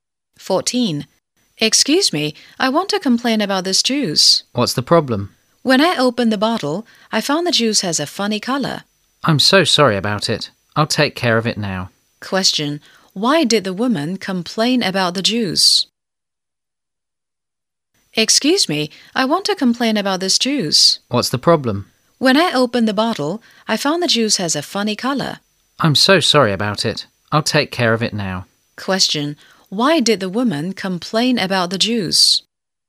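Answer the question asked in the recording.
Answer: The juice had a funny colour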